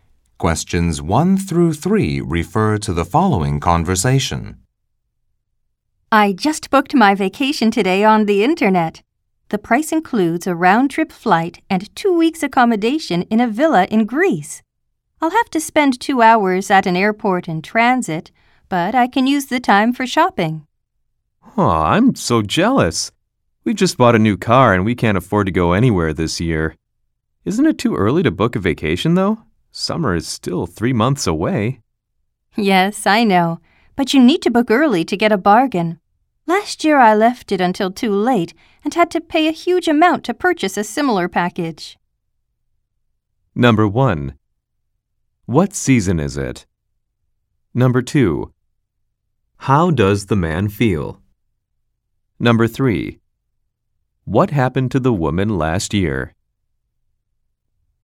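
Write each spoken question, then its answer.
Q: What season is it?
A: Spring

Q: How does the man feel?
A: Jealous

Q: What happened to the woman last year?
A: She booked too late and had to pay a huge amount for a similar package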